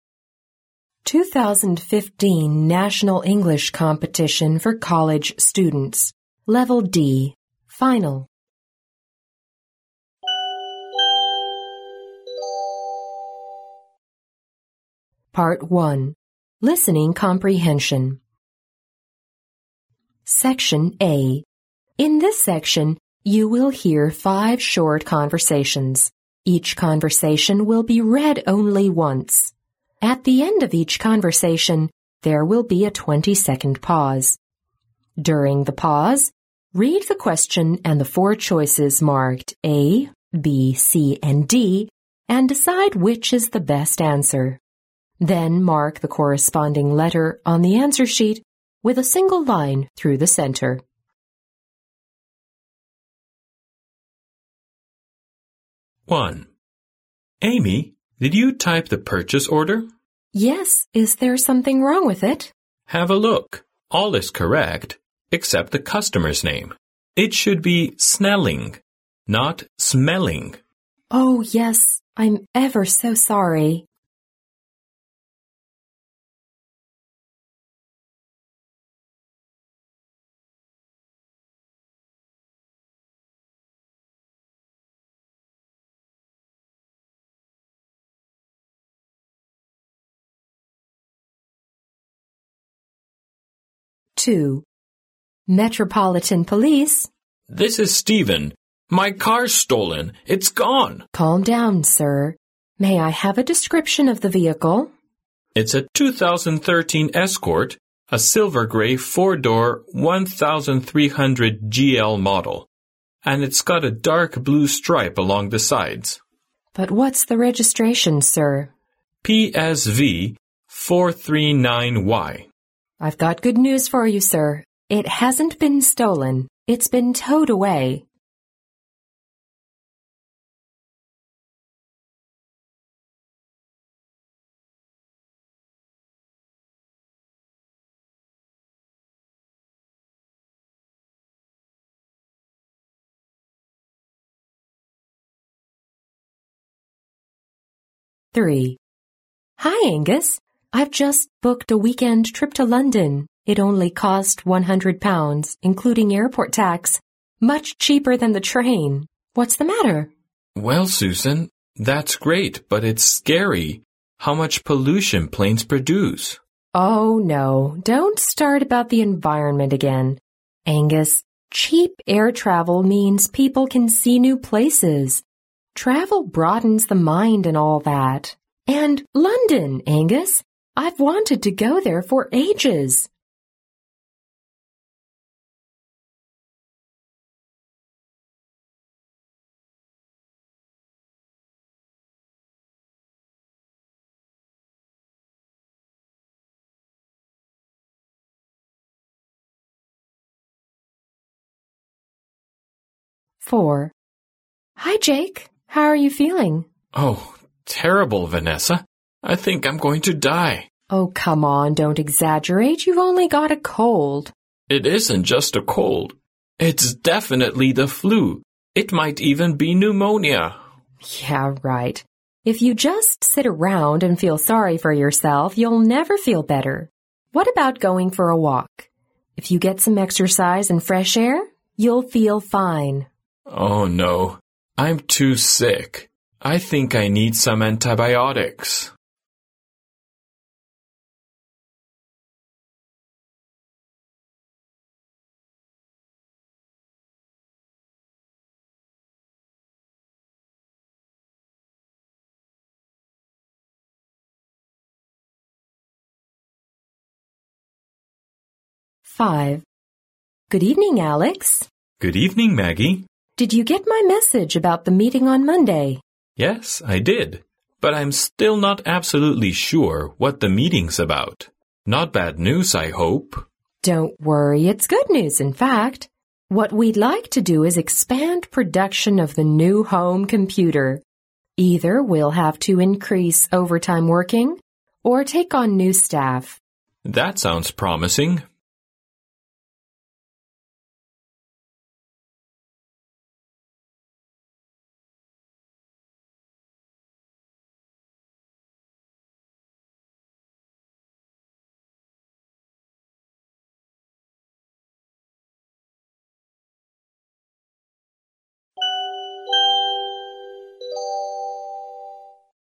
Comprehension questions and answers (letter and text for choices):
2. What happened to Steven's car?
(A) It was stolen.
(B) It was towed away.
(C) He sold it.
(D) He had it repaired.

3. What are the speakers talking about?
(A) Whether to fly to London.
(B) How much the trip will cost.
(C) Where to have a weekend trip.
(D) How much pollution planes produce.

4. How can Jake feel better in Vanessa's opinion?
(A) Stay in bed and relax.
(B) Sit around and drink more water.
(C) Get some exercise and fresh air.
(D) Have some antibiotics.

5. What is the meeting about?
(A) Whether or not to expand the company's production.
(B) How much longer the staff will have to work every day.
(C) Where to find more staff for the expanded production.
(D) How to cope with the company's expansion of production.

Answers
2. (B) It was towed away.
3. (A) Whether to fly to London.
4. (C) Get some exercise and fresh air.
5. (D) How to cope with the company's expansion of production.

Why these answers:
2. 对话中Steven报警,由警察说"It hasn't been stolen. It's been towed away"可知车没有被偷,而是被拖走了。因此答案选B。
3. 对话中,Susan说自己要乘飞机旅行,而Angus说"that's great but it's scary how much pollution planes produce",即他们在讨论是否应该选择坐飞机。因此答案选A。
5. 在对话中,Maggie告诉Alex,"What we'd like to do is expand production of the new home computers. Either we'll hays to increase overtime working or take on new staff",即会延长工作时间或者招聘新的员工来应对生产规模的扩大。因此答案为D。